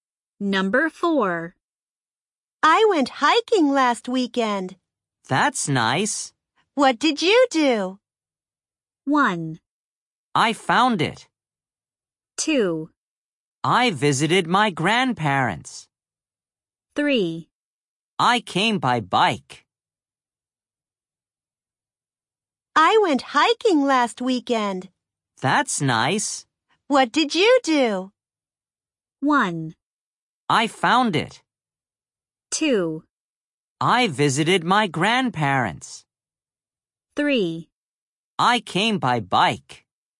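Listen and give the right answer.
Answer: 2: I visited my grandparents.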